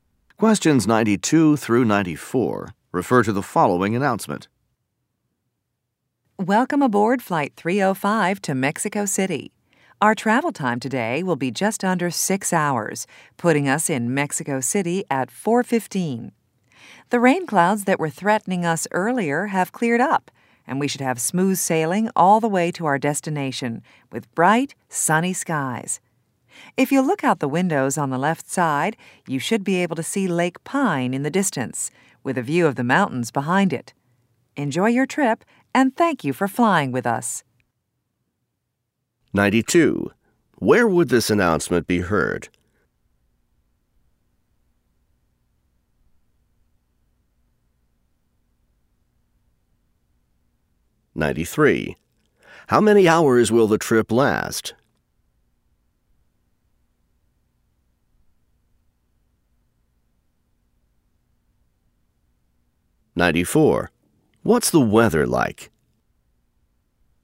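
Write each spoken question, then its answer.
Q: Where would this announcement be heard?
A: On an airplane

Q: How many hours will the trip last?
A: Just under 6 hours

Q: What's the weather like?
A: Sunny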